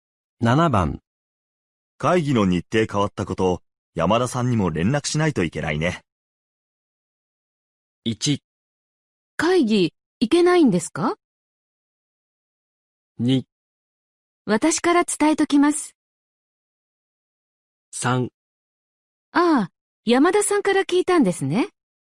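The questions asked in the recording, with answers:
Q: 会議の日程変わったこと、山田さんにも連絡しないといけないね。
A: 2: 私から伝えときます。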